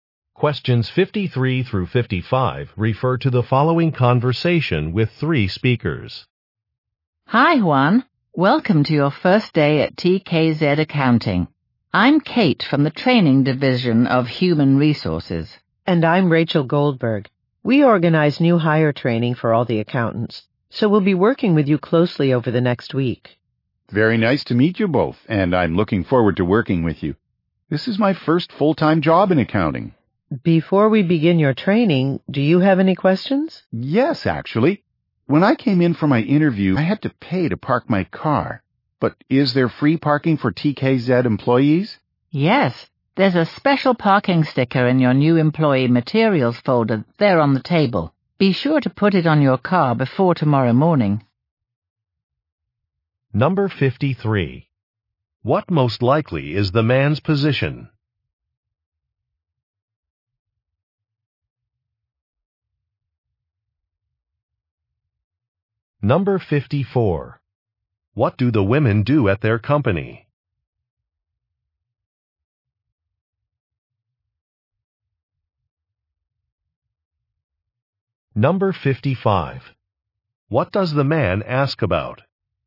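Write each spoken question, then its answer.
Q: What most likely is the man's position?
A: Accountant

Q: What do the women do at their company?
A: Organize new hire training

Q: What does the man ask about?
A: Free parking for employees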